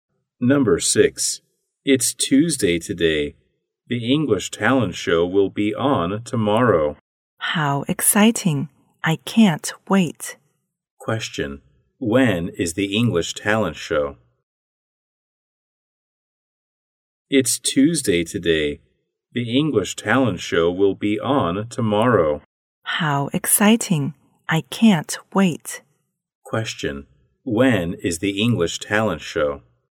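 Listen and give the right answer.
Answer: Wednesday (tomorrow)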